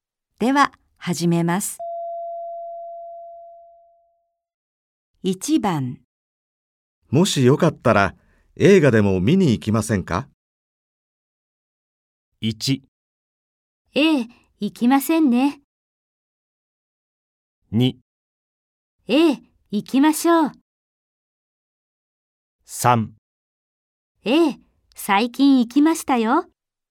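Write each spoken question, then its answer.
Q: もしよかったら、映画でも見に行きませんか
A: 2: ええ、行きましょう。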